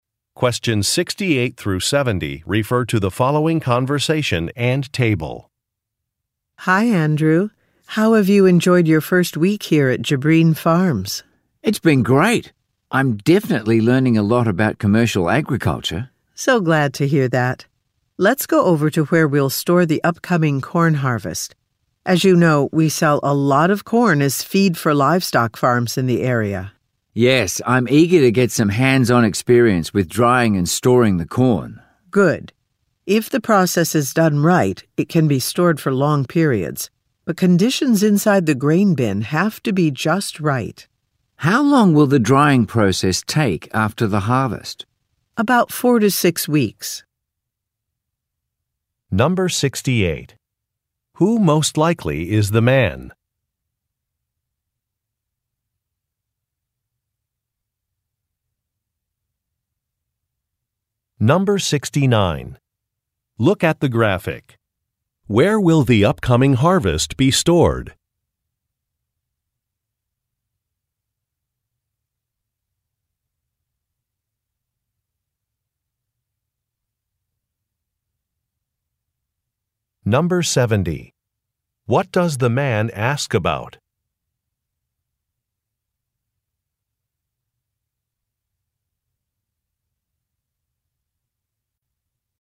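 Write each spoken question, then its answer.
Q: Who most likely is the man?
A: A new employee at the farm, in his first week

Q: What does the man ask about?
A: How long the corn drying process takes after the harvest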